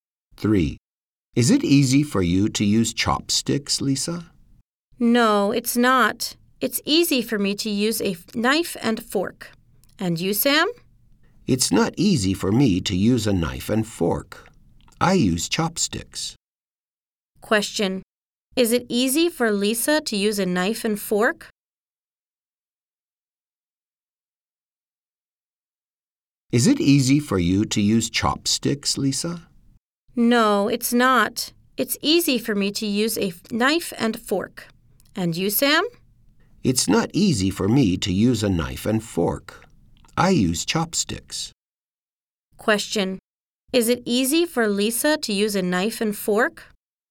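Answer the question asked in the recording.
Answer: Yes, it is.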